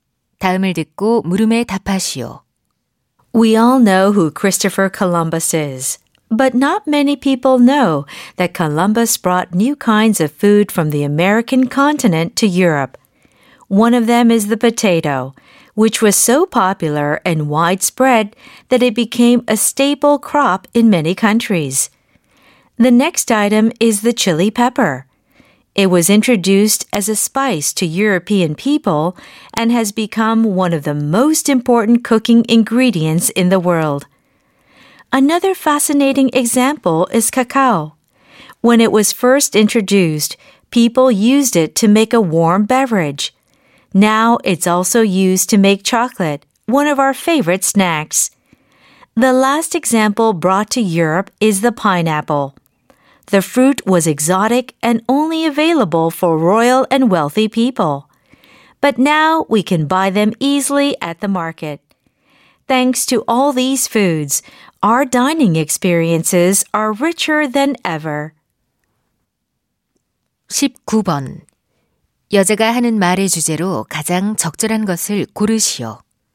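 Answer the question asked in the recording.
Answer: 콜럼버스가 아메리카에서 유럽으로 들여온 음식들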